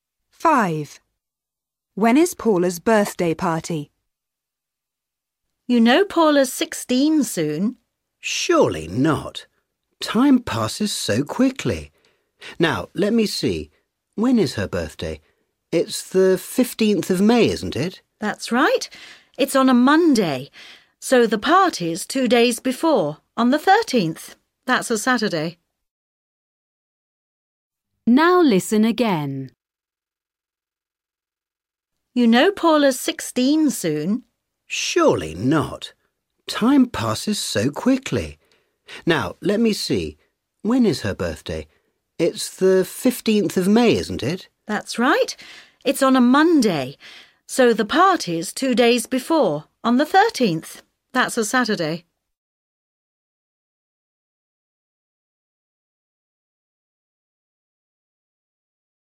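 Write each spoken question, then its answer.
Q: When is Paula's birthday party?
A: Saturday the 13th of May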